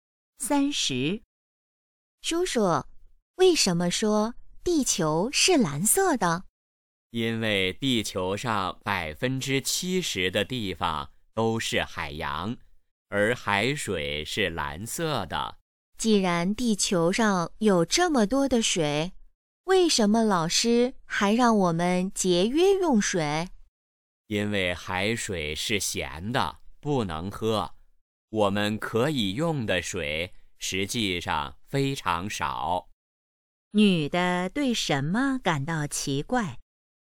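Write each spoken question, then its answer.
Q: 女的对什么感到奇怪?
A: 地球水这么多为什么还要节约用水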